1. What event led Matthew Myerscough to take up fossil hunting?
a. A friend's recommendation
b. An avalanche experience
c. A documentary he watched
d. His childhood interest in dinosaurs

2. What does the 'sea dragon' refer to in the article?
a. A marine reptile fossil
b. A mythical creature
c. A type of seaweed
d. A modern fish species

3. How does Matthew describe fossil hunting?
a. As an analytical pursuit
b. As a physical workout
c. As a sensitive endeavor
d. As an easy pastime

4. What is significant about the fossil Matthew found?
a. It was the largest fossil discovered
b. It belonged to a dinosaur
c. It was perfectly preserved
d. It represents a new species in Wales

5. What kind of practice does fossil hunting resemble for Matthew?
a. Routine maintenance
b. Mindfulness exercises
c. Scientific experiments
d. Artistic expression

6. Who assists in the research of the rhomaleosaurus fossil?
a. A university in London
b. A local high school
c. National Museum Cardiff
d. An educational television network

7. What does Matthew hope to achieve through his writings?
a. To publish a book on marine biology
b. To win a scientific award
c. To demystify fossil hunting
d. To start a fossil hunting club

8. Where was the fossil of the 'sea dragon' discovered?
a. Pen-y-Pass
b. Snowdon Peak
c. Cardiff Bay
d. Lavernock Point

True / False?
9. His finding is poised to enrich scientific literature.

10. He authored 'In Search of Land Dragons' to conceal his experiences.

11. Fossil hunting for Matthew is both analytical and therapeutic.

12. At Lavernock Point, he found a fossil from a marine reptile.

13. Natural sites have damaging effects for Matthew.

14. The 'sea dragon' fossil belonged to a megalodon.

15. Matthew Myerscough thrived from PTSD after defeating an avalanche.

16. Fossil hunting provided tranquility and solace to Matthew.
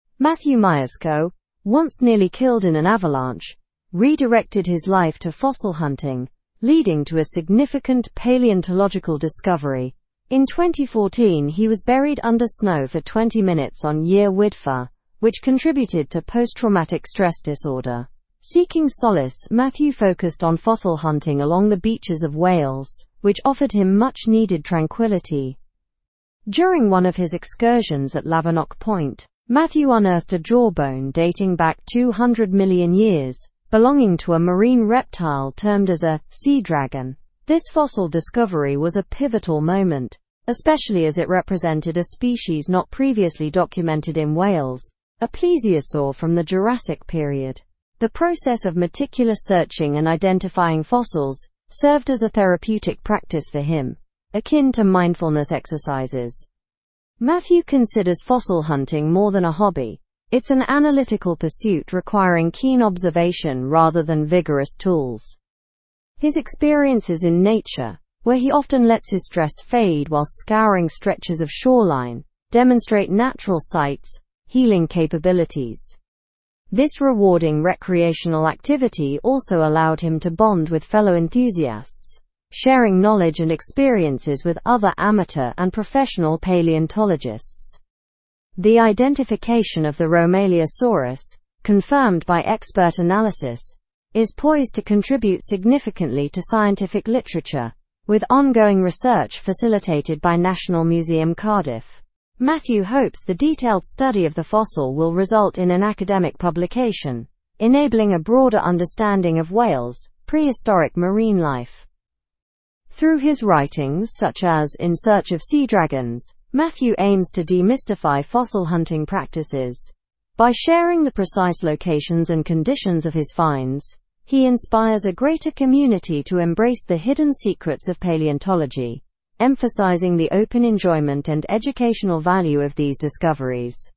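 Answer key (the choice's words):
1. An avalanche experience
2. A marine reptile fossil
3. As an analytical pursuit
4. It represents a new species in Wales
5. Mindfulness exercises
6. National Museum Cardiff
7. To demystify fossil hunting
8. Lavernock Point
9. True
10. False
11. True
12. True
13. False
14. False
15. False
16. True

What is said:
Matthew Myerscough, once nearly killed in an avalanche, redirected his life to fossil hunting, leading to a significant paleontological discovery. In 2014, he was buried under snow for 20 minutes on Yr Wyddfa, which contributed to post-traumatic stress disorder. Seeking solace, Matthew focused on fossil hunting along the beaches of Wales, which offered him much-needed tranquility.
During one of his excursions at Lavernock Point, Matthew unearthed a jawbone dating back 200 million years, belonging to a marine reptile termed as a 'sea dragon.' This fossil discovery was a pivotal moment, especially as it represented a species not previously documented in Wales, a plesiosaur from the Jurassic period. 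The process of meticulous searching and identifying fossils served as a therapeutic practice for him, akin to mindfulness exercises.
Matthew considers fossil hunting more than a hobby; it's an analytical pursuit requiring keen observation rather than vigorous tools. His experiences in nature, where he often lets his stress fade while scouring stretches of shoreline, demonstrate natural sites' healing capabilities. This rewarding recreational activity also allowed him to bond with fellow enthusiasts, sharing knowledge and experiences with other amateur and professional paleontologists.
The identification of the rhomaleosaurus, confirmed by expert analysis, is poised to contribute significantly to scientific literature, with ongoing research facilitated by National Museum Cardiff. Matthew hopes the detailed study of the fossil will result in an academic publication, enabling a broader understanding of Wales' prehistoric marine life.
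Through his writings, such as 'In Search of Sea Dragons,' Matthew aims to demystify fossil hunting practices. By sharing the precise locations and conditions of his finds, he inspires a greater community to embrace the hidden secrets of paleontology, emphasizing the open enjoyment and educational value of these discoveries.

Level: Level 4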